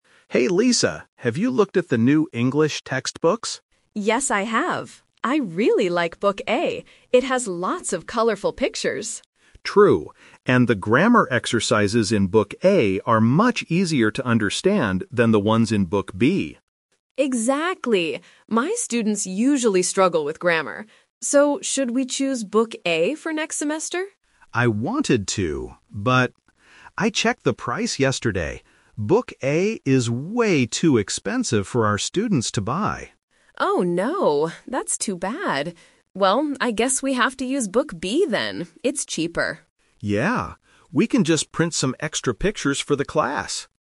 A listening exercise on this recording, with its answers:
Listen to the conversation and choose the correct answer (A, B, or C).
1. What do the teachers like about Book A?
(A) It is very cheap for the students.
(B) It has lots of pictures and easy exercises.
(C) It has great listening tests.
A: (B) It has lots of pictures and easy exercises.

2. What is the problem with Book A?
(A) It is too expensive.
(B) The grammar is too difficult.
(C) It doesn't have any pictures.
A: (A) It is too expensive.

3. Which textbook do they decide to use?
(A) Book A, because the exercises are easy.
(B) Book B, because it costs less money.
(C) They decide not to use any textbooks.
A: (B) Book B, because it costs less money.

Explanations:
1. Mark and Lisa both agree that Book A has "lots of colorful pictures" and the exercises are "much easier to understand." Option A is a trap (Book A is actually too expensive). Option C is a plausible feature of an English book, but it is not mentioned in the audio.
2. Mark says, "Book A is way too expensive for our students to buy." Option B is a trap because the grammar in Book A is actually easy; Book B might be the difficult one. Option C is a trap because Book A has lots of pictures.
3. This question uses the "Twist" technique. The teachers initially want to use Book A because of the pictures and easy exercises, but they change their minds when they realize the price is too high. They settle for Book B because "it's cheaper." Option A is the main trap (what they wanted to do at first). Option C is incorrect.

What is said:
Mark: Hey Lisa, have you looked at the new English textbooks?
Lisa: Yes, I have. I really like Book A. It has lots of colorful pictures.
Mark: True. And the grammar exercises in Book A are much easier to understand than the ones in Book B.
Lisa: Exactly! My students usually struggle with grammar. So, should we choose Book A for next semester?
Mark: I wanted to, but... I checked the price yesterday. Book A is way too expensive for our students to buy.
Lisa: Oh no, that's too bad. Well, I guess we have to use Book B then.

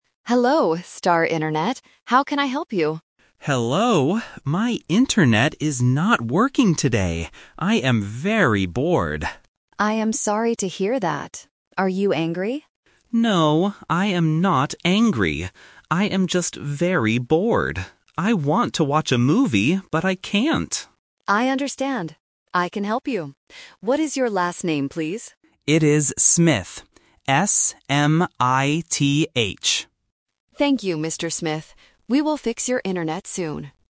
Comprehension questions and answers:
Listen to the conversation and choose the correct answer for each question.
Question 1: How does the customer feel today?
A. Angry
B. Bored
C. Happy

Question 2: What does the customer want to do?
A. Watch a movie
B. Play a game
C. Sleep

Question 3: What is the customer's last name?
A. Swift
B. Smyth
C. Smith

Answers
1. B. Bored
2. A. Watch a movie
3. C. Smith

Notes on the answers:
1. The correct answer is (B). The customer says twice, "I am very bored." Option (A) "Angry" is the trap; the representative asks, "Are you angry?" but the customer replies, "No, I am not angry." Option (C) "Happy" is not mentioned and does not fit the context.
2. The correct answer is (A). The customer explicitly says, "I want to watch a movie, but I can't." Options (B) "Play a game" and (C) "Sleep" are plausible things to do at home, but they are never mentioned in the audio.
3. The correct answer is (C). The customer spells his name very clearly: "S-M-I-T-H." Option (A) "Swift" and Option (B) "Smyth" are sound traps because they sound very similar to the correct name.

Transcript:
Representative: Hello, Star Internet. How can I help you?
Customer: Hello. My internet is not working today. I am very bored.
Representative: I am sorry to hear that. Are you angry?
Customer: No, I am not angry. I am just very bored. I want to watch a movie, but I can't.
Representative: I understand. I can help you. What is your last name, please?

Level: A1

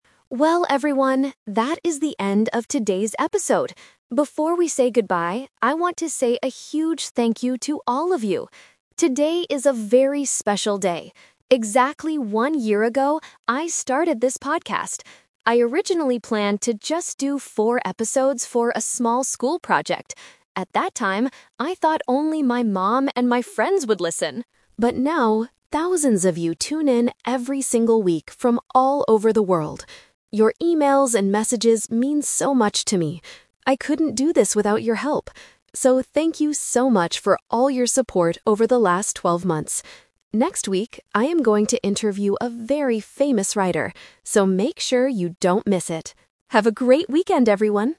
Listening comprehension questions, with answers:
Listen to the podcast announcement and choose the correct answer (A, B, or C).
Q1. What is the podcaster celebrating today?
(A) The one-year anniversary of the podcast.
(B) Her mother's birthday.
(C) The end of her school project.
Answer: (A) The one-year anniversary of the podcast.

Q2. How many episodes did she originally plan to make?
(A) Four.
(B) Twelve.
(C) A thousand.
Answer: (A) Four.

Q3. Who did she think would listen to the podcast at the beginning?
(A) Thousands of people.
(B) A famous writer.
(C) Her family and friends.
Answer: (C) Her family and friends.

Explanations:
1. The host says, "Today is a very special day. Exactly one year ago, I started this podcast" and thanks them for their support "over the last twelve months". Trap: Option (C) is a trap. The podcast started as a school project, but she is not celebrating the end of it today. Option (B) uses the word "mom" which is in the audio, but not for a birthday.
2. The host explains her original plan: "I originally planned to just do four episodes..." Trap: Option (B) uses the number 12 (twelve months), and Option (C) uses the number 1000 (thousands of listeners). This tests the student's ability to match the correct number to the correct noun.
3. She says, "I thought only my mom and my friends would listen!" Trap: Option (A) is the "Expectation vs. Reality" trap. Thousands of people listen now (reality), but at the beginning, she expected only her family to listen. Option (B) is the guest for next week.

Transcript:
Host: Well, everyone, that is the end of today's episode. Before we say goodbye, I want to say a huge thank you to all of you. Today is a very special day. Exactly one year ago, I started this podcast. I originally planned to just do four episodes for a small school project. At that time, I thought only my mom and my friends would listen! But now, thousands of you tune in every single week from all over the world. Your emails and messages mean so much to me. I couldn't do this without your help. So, thank you so much for all your support over the last twelve months. Next week, I am going to interview a very famous writer, so make sure you don't miss it. Have a great weekend, everyone!

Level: A2

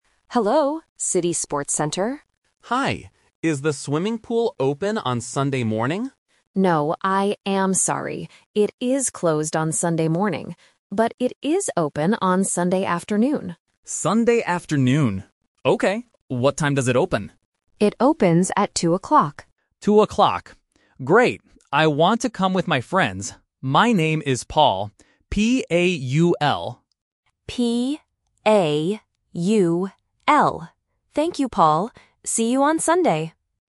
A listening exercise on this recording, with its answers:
Listen to the phone call to a sports center. Choose the correct answer (A, B, or C) for each question.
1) When is the swimming pool open?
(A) Sunday morning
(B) Sunday afternoon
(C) Saturday morning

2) What time does the pool open?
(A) 2:00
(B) 10:00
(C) 12:00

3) How do you spell the customer's name?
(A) P-O-U-L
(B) B-A-U-L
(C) P-A-U-L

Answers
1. (B) Sunday afternoon
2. (A) 2:00
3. (C) P-A-U-L

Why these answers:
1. The receptionist says, "But it is open on Sunday afternoon." Option (A) is a trap; the customer asks about Sunday morning, but the receptionist explicitly says, "It is closed on Sunday morning." Option (C) "Saturday morning" is not mentioned in the audio.
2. The receptionist states, "It opens at two o'clock," and the customer repeats "Two o'clock." Option (C) "12:00" (twelve) is a phonetic trap because it sounds a little similar to "two". Option (B) "10:00" is never mentioned.
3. The customer spells his name clearly as "P-A-U-L". Option (A) uses an 'O' instead of an 'A'. Option (B) uses a 'B' instead of a 'P', which tests the listener's ability to tell the difference between the /b/ and /p/ sounds.

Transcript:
Receptionist: Hello, City Sports Center.
Customer: Hi. Is the swimming pool open on Sunday morning?
Receptionist: No, I am sorry. It is closed on Sunday morning. But it is open on Sunday afternoon.
Customer: Sunday afternoon. Okay. What time does it open?
Receptionist: It opens at two o'clock.
Great. I want to come with my friends. My name is Paul.
Receptionist: P-A-U-L. Thank you, Paul. See you on Sunday!

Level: A1

